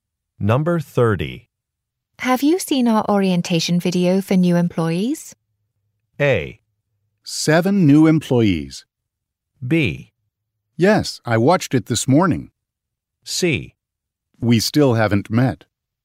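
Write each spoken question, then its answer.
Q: Have you seen our orientation video for new employees?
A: B: Yes, I watched it this morning.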